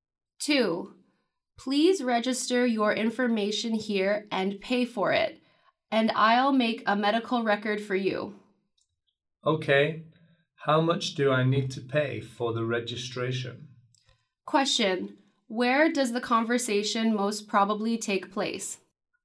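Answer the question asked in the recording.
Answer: In a hospital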